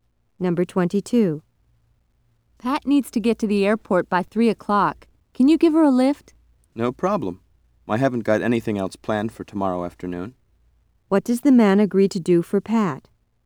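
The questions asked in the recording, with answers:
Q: What does the man agree to do for Pat?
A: Drive her to the airport.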